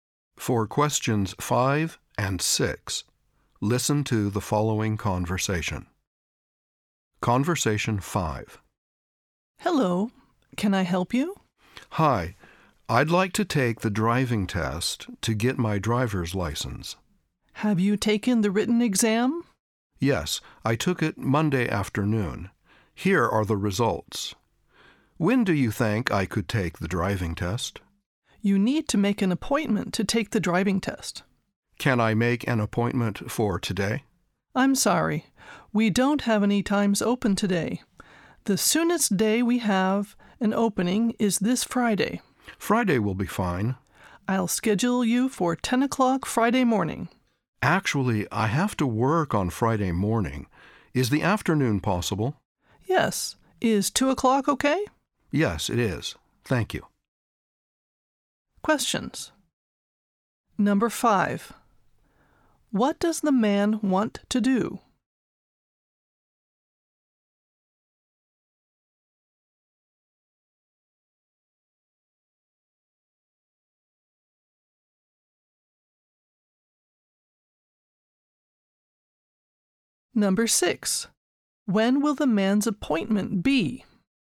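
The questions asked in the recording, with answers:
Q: What does the man want to do?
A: Take the driving test to get his driver's license

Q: When will the man's appointment be?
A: Friday at 2 o'clock in the afternoon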